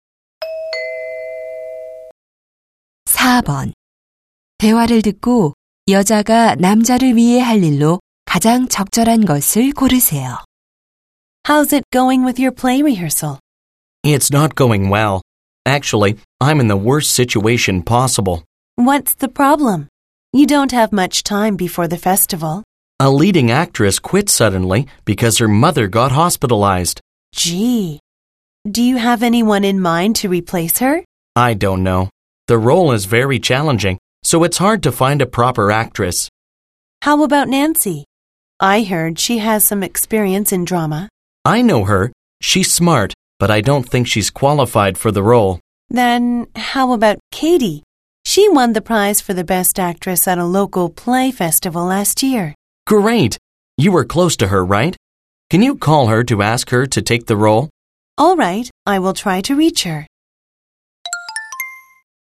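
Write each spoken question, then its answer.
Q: 대화를 듣고 여자가 남자를 위해 할 일로 가장 적절한 것을 고르세요.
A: Katie에게 전화해 역할을 맡아 달라고 부탁하기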